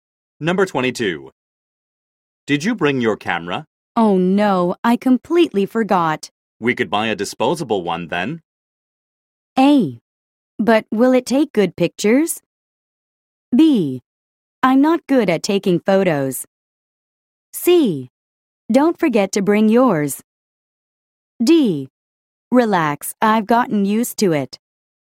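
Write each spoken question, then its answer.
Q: We could buy a disposable one then.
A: A: But will it take good pictures?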